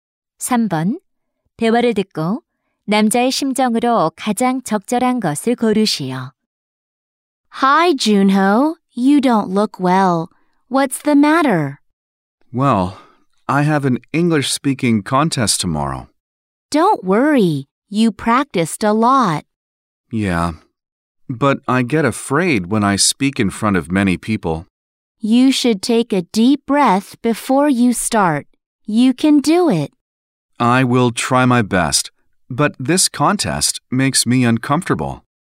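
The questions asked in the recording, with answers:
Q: 대화를 듣고 남자의 심정으로 가장 적절한 것을 고르시오.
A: 긴장되고 불안함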